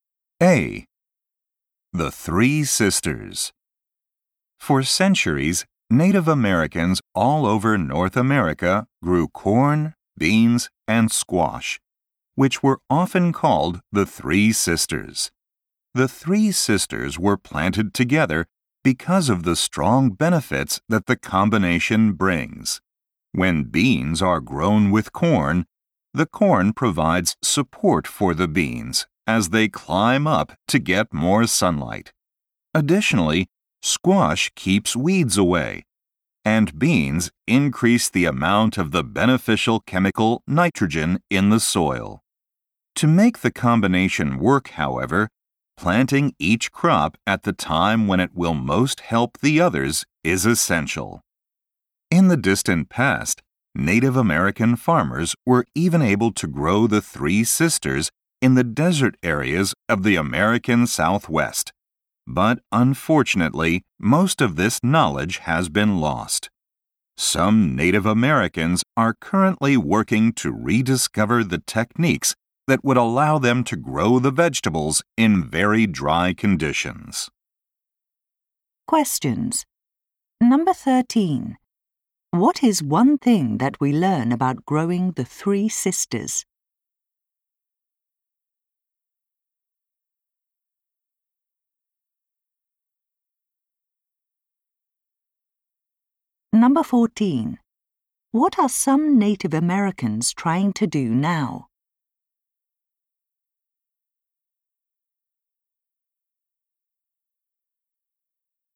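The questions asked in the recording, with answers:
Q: What is one thing that we learn about growing the Three Sisters?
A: Each crop must be planted at the right time to help the others.

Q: What are some Native Americans trying to do now?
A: Rediscover techniques for growing the vegetables in very dry conditions.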